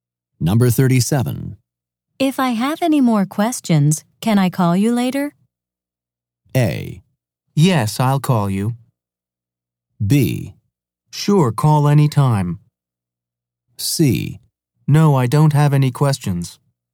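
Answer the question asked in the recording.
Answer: B: Sure, call any time.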